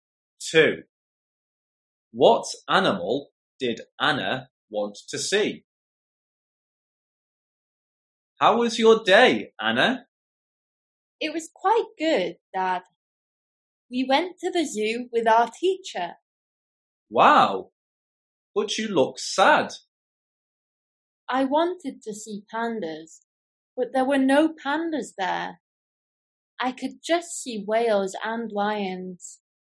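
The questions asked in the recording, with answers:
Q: What animal did Anna want to see?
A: Pandas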